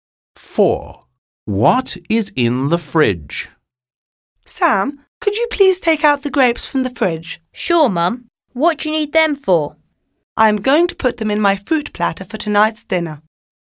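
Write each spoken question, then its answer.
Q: What is in the fridge?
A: grapes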